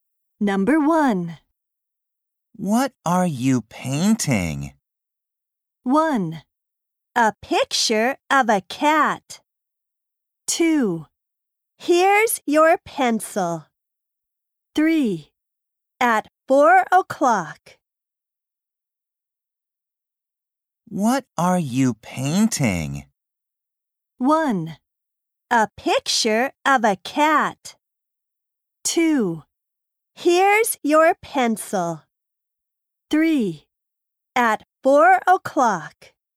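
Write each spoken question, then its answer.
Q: What are you painting?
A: 1: A picture of a cat.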